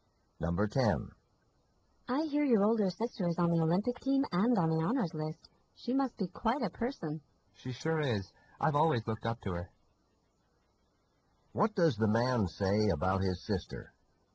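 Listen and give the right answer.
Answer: He has always admired her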